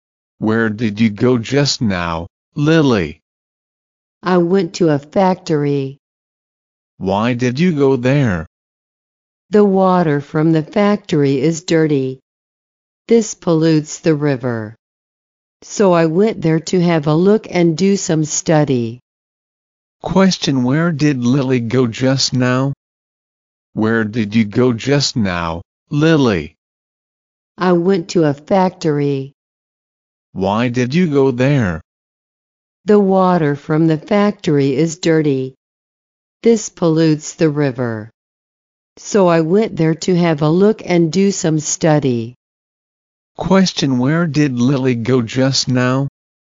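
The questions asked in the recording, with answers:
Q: Question, where did Lily go just now?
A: To a factory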